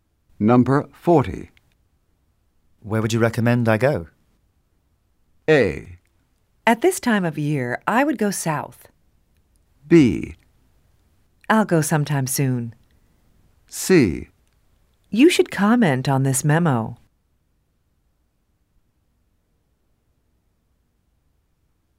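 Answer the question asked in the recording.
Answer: A: At this time of year, I would go south.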